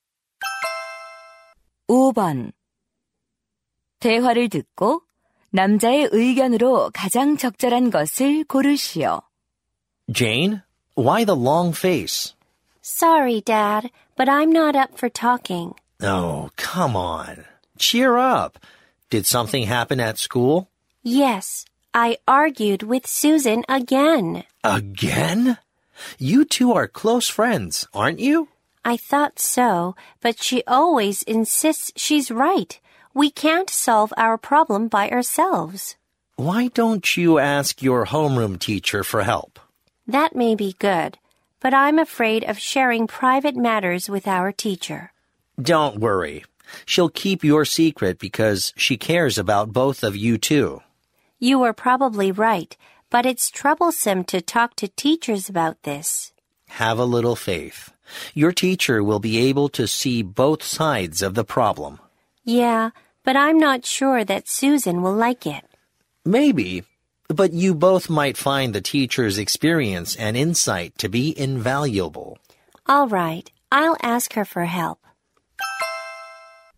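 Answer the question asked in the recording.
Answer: 친구와의 갈등은 담임 선생님께 도움을 요청해 해결하는 것이 좋다.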